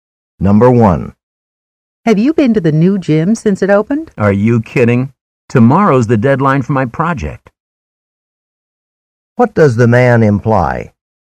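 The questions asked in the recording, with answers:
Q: What does the man imply?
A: He hasn't been to the new gym; he's busy with his project due tomorrow.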